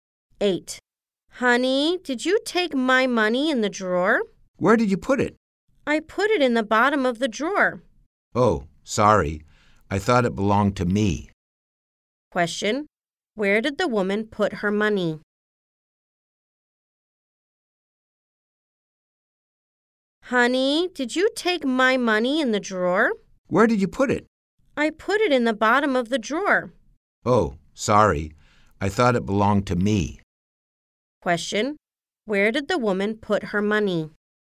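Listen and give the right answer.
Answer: In the bottom of the drawer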